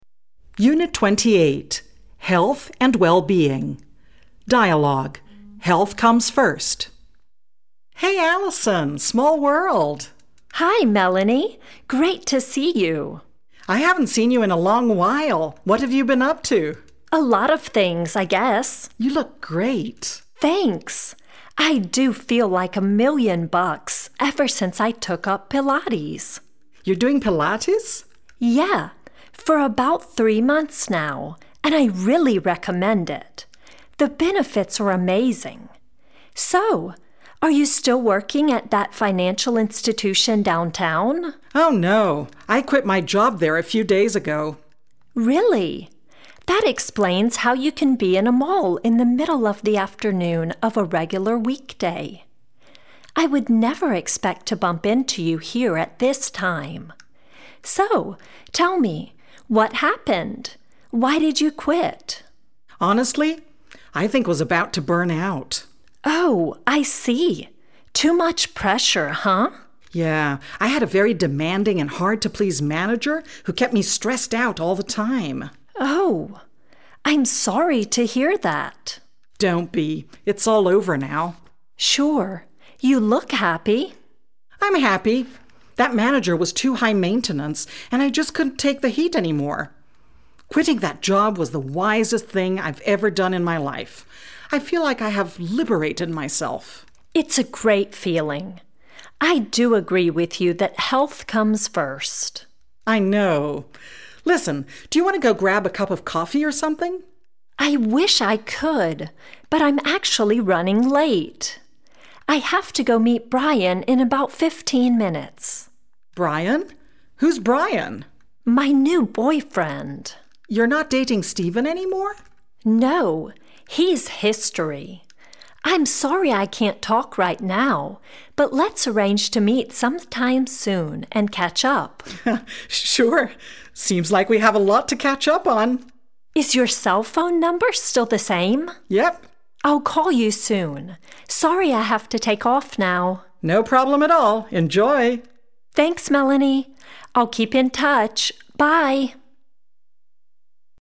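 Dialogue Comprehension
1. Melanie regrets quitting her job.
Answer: False

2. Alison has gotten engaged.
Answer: False

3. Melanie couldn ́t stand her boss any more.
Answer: True

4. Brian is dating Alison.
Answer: True

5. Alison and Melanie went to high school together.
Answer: I don ́t know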